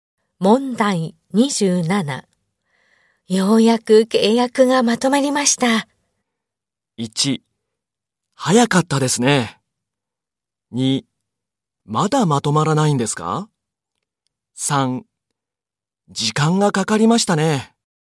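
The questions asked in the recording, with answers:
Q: ようやく契約がまとまりました。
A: 3: 時間がかかりましたね。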